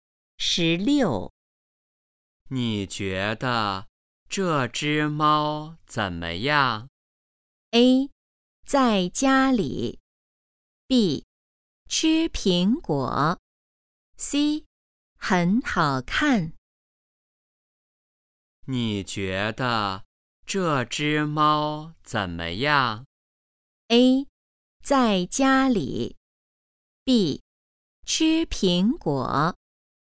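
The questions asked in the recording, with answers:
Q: 你觉得这只猫怎么样?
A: C: 很好看。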